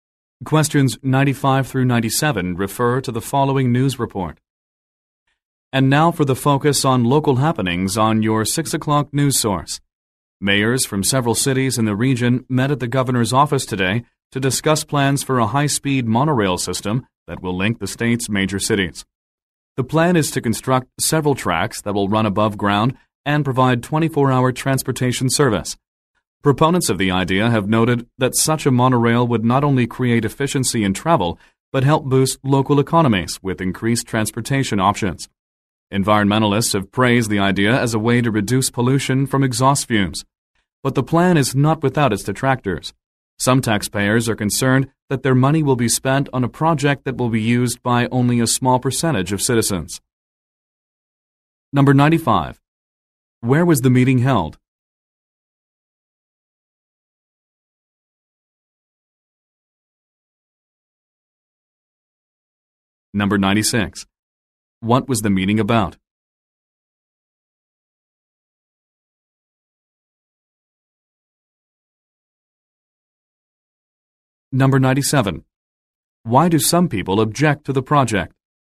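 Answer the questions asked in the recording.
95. At the governor's office
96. A high-speed monorail system
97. Tax money would go to a project used by few citizens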